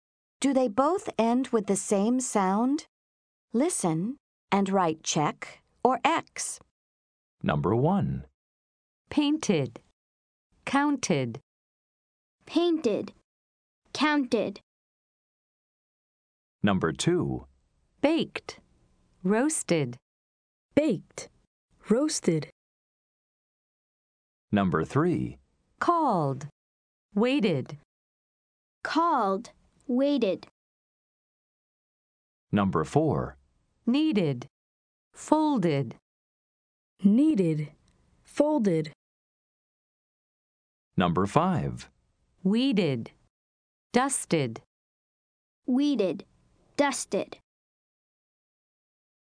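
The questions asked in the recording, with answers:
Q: Painted. Counted.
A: Yes (check): both end with the same sound

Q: Baked. Roasted.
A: No (X): they end with different sounds

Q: Called. Waited.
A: No (X): they end with different sounds

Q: Needed. Folded.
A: Yes (check): both end with the same sound

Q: Weeded. Dusted.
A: Yes (check): both end with the same sound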